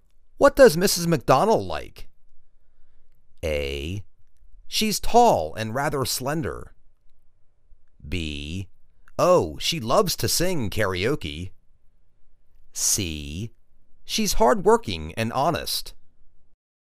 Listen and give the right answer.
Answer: Oh, she loves to sing karaoke.